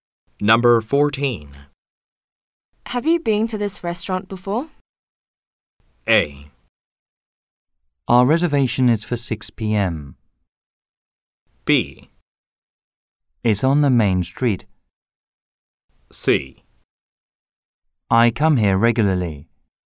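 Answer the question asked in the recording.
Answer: C: I come here regularly.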